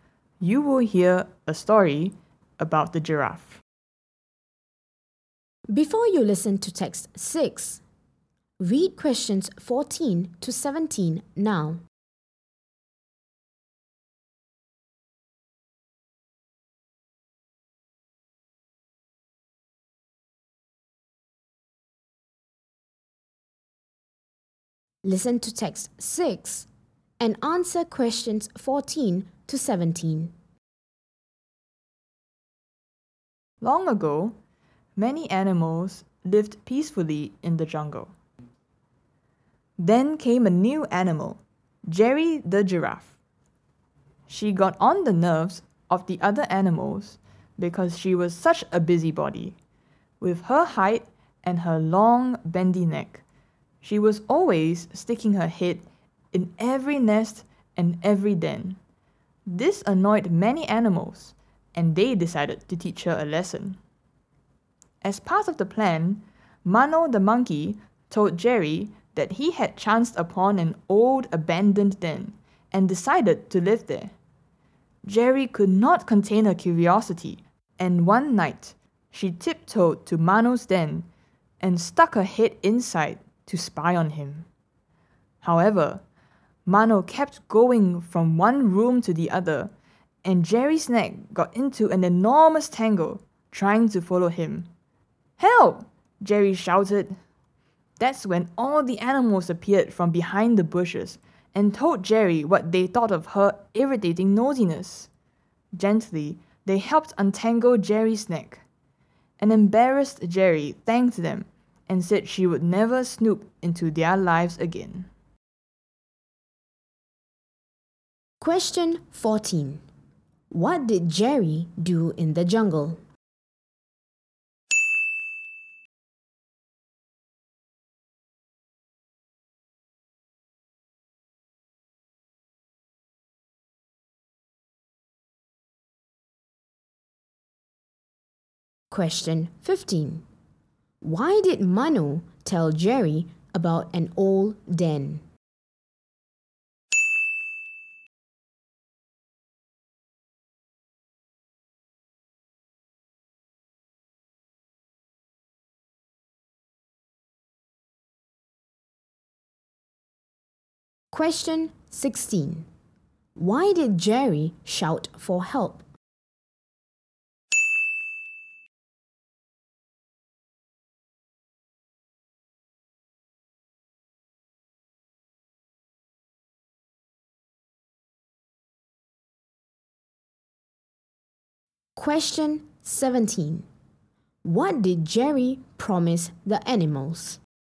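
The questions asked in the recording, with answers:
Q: What did Jerry do in the jungle?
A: She stuck her head in every nest and den, being a busybody

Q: Why did Mano tell Jerry about an old den?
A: As part of a plan to teach her a lesson

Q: Why did Jerry shout for help?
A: Her neck got tangled

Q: What did Jerry promise the animals?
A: She would never snoop into their lives again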